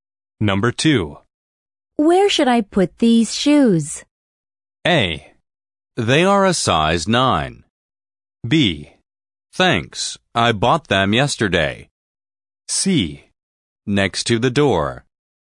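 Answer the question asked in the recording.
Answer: C: Next to the door.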